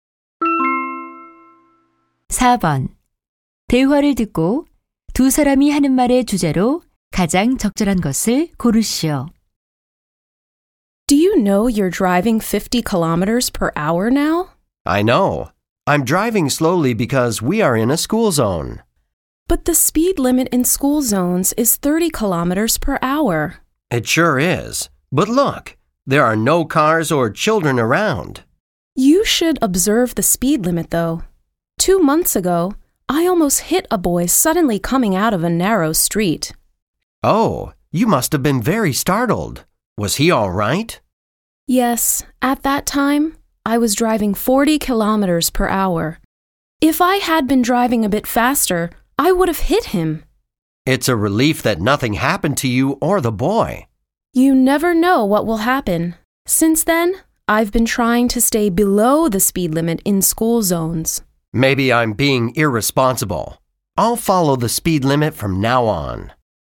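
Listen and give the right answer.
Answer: 스쿨존에서 제한 속도를 지켜야 한다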